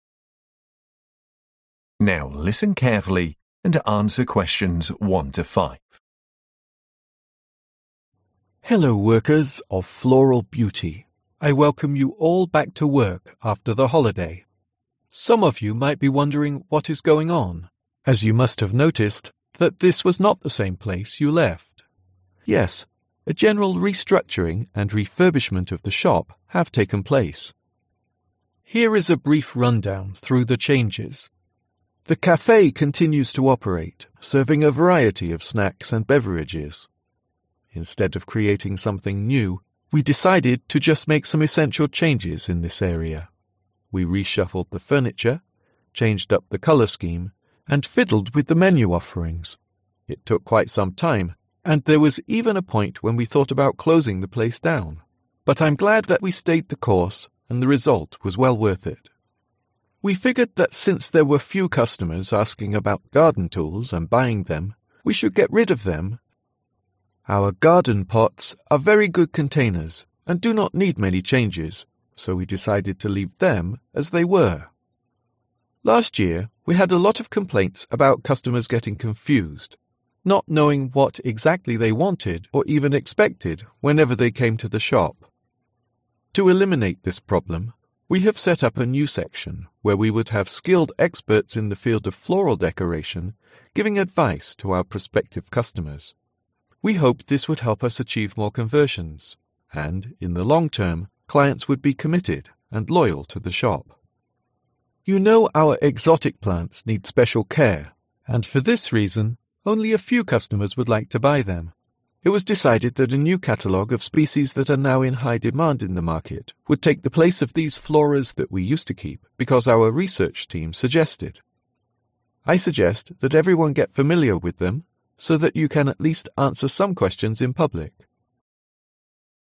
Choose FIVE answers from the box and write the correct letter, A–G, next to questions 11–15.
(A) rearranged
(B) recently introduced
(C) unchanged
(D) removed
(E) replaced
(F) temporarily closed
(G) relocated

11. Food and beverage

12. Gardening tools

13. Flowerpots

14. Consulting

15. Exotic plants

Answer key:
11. A
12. D
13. C
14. B
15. E

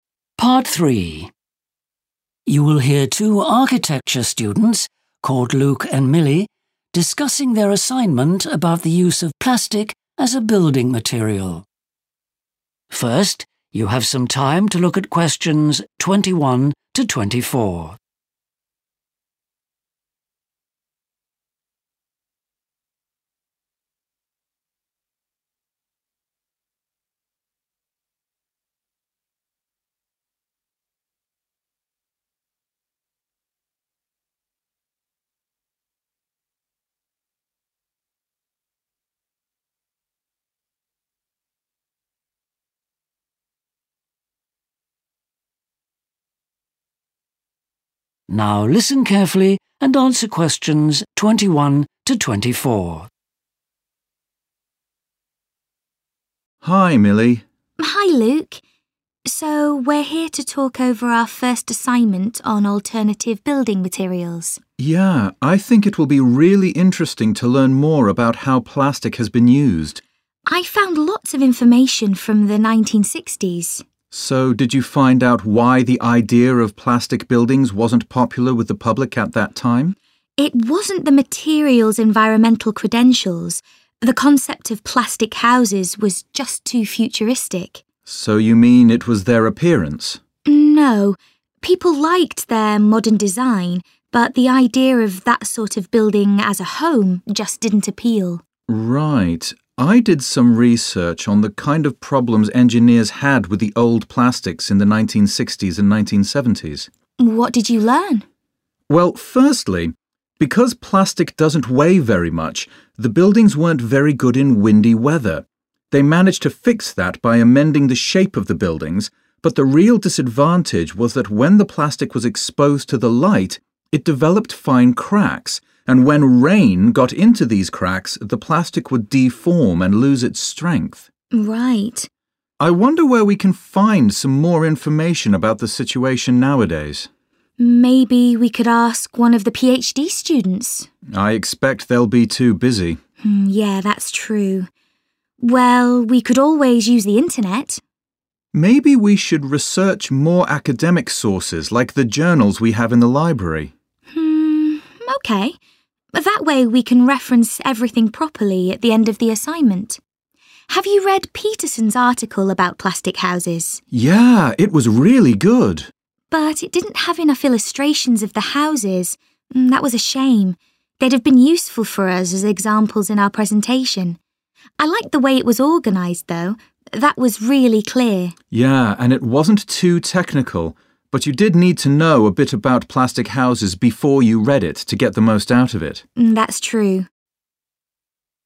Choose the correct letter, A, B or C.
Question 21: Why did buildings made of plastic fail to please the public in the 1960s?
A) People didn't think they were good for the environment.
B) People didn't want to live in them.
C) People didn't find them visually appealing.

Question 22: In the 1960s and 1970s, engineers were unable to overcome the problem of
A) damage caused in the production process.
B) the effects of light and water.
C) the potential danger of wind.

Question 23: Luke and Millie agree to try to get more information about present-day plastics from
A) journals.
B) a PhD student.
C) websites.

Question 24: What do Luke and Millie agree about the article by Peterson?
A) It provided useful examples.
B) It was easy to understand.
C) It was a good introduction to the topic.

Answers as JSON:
{"21": "B", "22": "B", "23": "A", "24": "B"}

